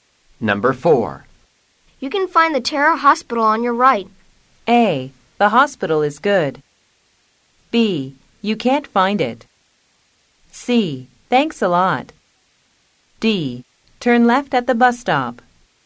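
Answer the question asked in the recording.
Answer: C: Thanks a lot.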